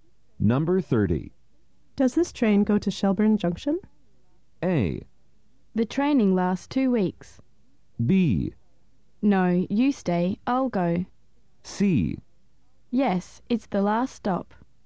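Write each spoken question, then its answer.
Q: Does this train go to Shelburne Junction?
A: C: Yes, it's the last stop.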